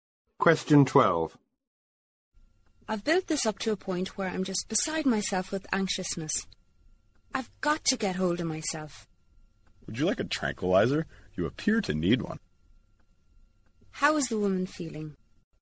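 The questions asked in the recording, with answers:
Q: How is the woman feeling?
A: Very anxious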